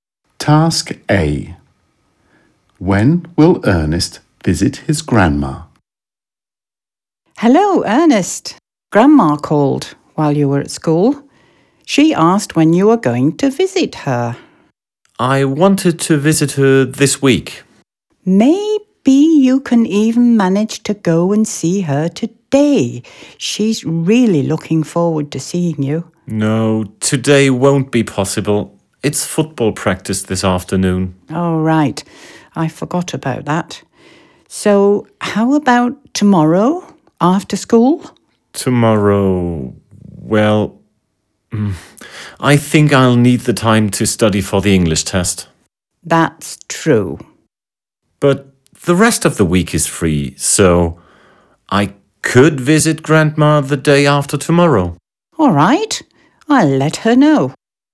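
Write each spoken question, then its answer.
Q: When will Ernest visit his grandma?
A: The day after tomorrow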